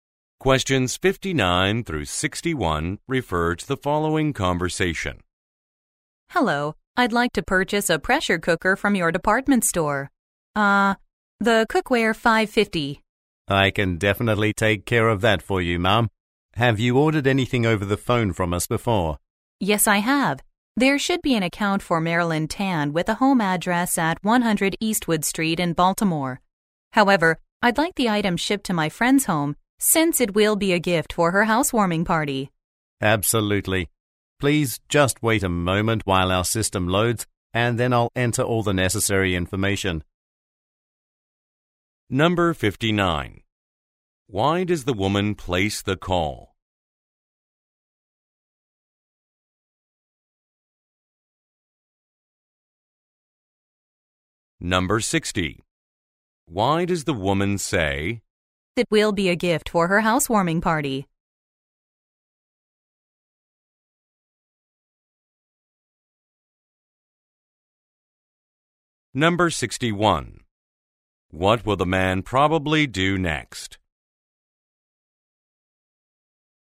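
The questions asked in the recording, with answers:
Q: Why does the woman place the call?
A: To buy a pressure cooker

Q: Why does the woman say, "It will be a gift for her housewarming party"?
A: To explain why she wants it shipped to her friend's home

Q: What will the man probably do next?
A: Enter her order information once the system loads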